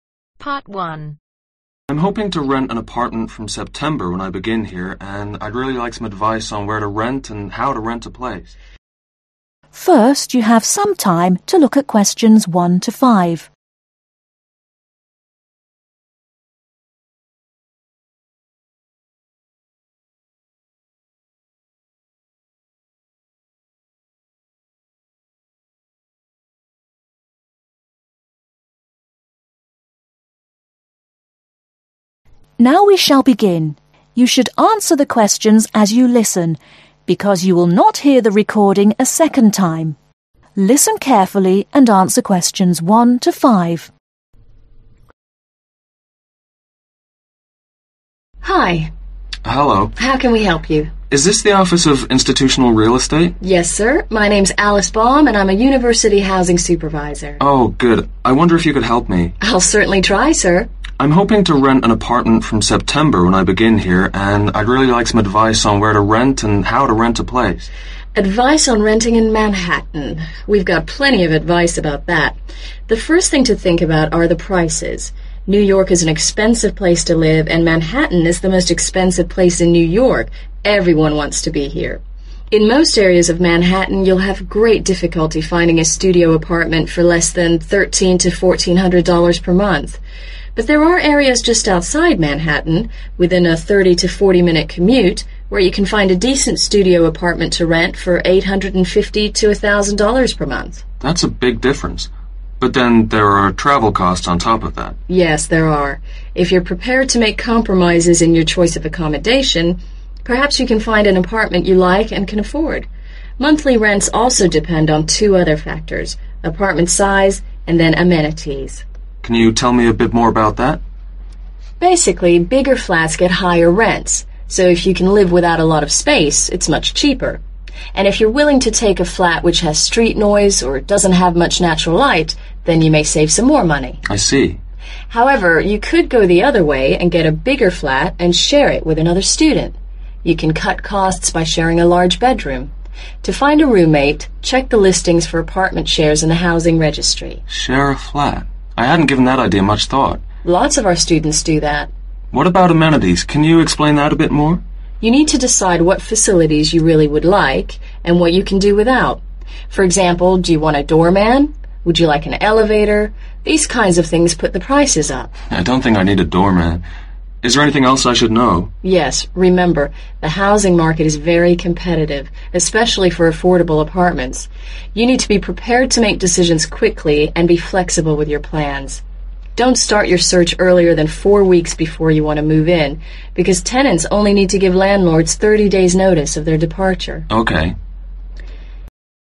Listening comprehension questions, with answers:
Complete the notes below. Write ONE WORD ONLY for each answer.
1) Manhattan is the most (1)........... area in New York.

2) but within 30 – 40 (2) .......... distance prices are $850 – $1.000.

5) when you are looking, be ready to take quick decisions and be (5)............ with your plants.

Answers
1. expensive
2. minutes
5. flexible